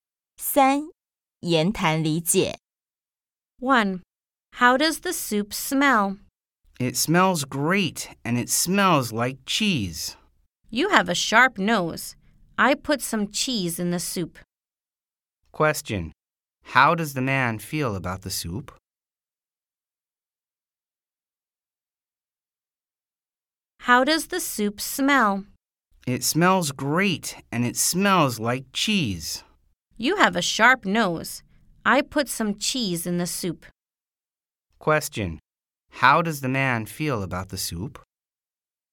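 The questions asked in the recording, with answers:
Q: Question, how does the man feel about the soup?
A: It smells great, like cheese.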